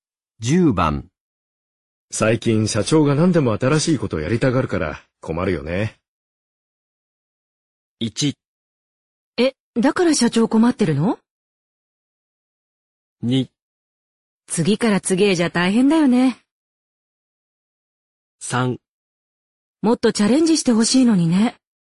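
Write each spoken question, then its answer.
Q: 最近社長が何でも新しいことをやりたがるから困るよね。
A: 2: 次から次へじゃ大変だよね。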